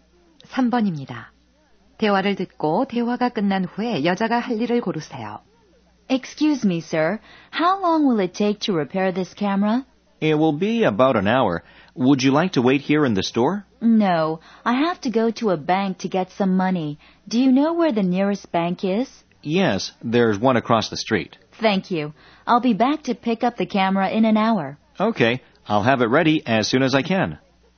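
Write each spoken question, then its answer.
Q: 대화를 듣고 대화가 끝난 후에 여자가 할 일을 고르세요.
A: 은행에 가서 돈을 찾는다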